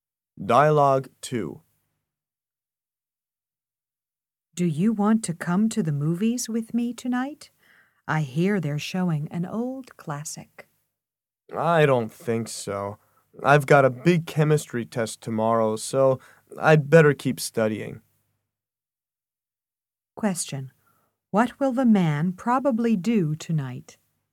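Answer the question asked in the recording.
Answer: Study for his chemistry test.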